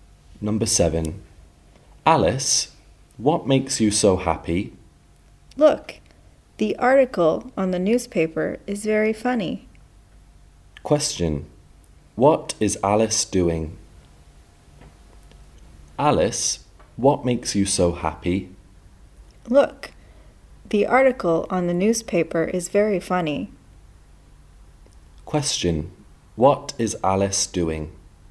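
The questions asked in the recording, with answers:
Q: What is Alice doing?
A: Reading a newspaper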